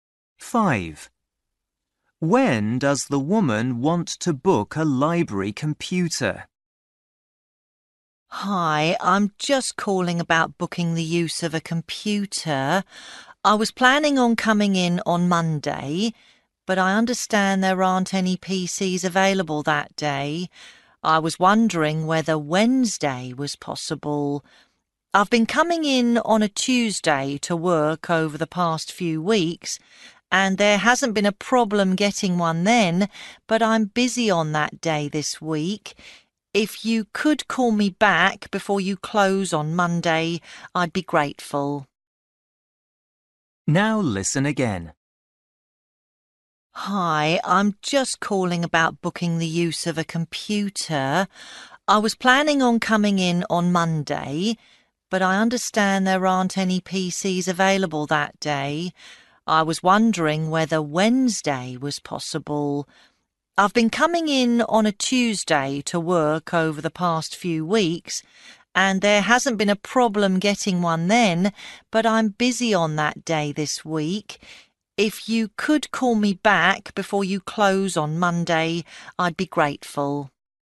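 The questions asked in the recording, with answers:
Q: When does the woman want to book a library computer?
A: Wednesday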